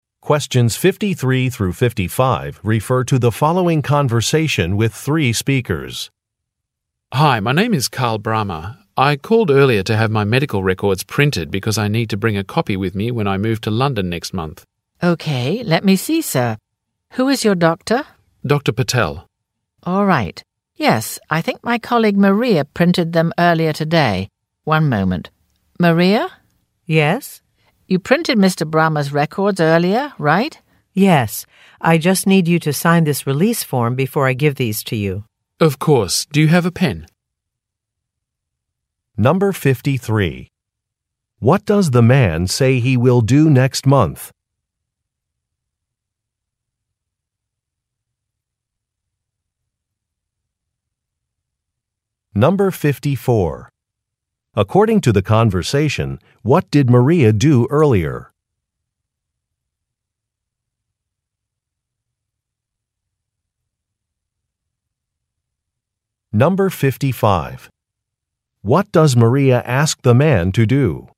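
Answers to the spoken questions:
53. Move to London
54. She printed Mr. Brahma's medical records
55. Sign a release form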